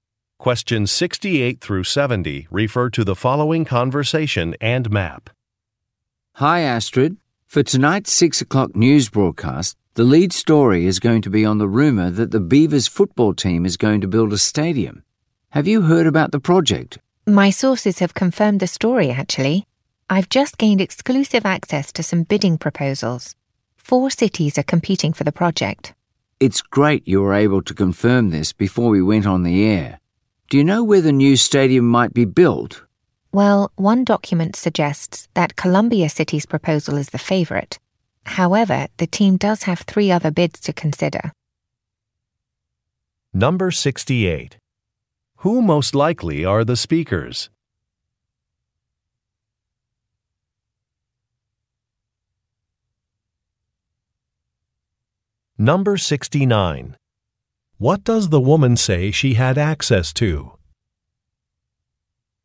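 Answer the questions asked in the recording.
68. News reporters
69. Bidding proposals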